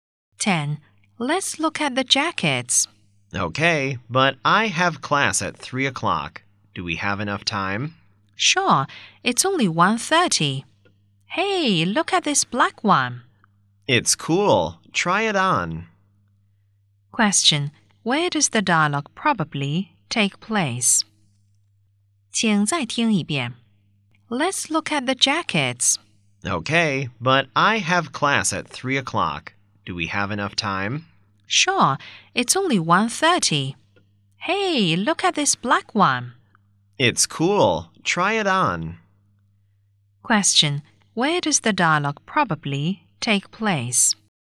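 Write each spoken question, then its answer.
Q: Where does the dialogue probably take place?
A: In a clothes shop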